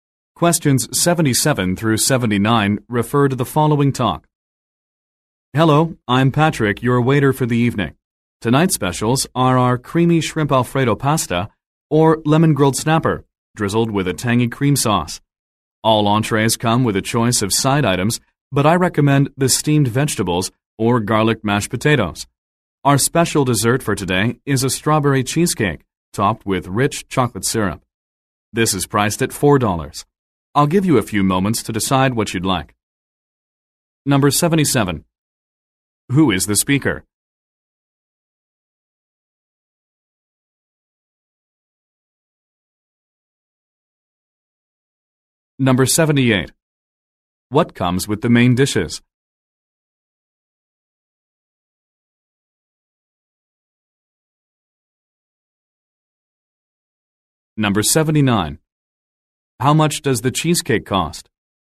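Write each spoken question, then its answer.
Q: Who is the speaker?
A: A waiter

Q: What comes with the main dishes?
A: A choice of side items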